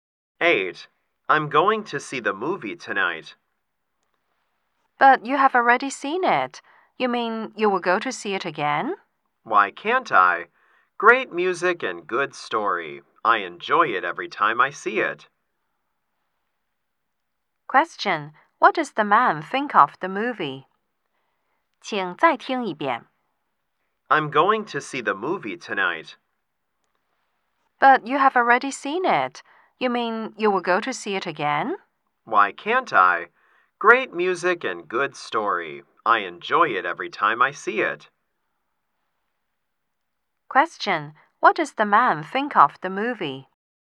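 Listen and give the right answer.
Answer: He likes it very much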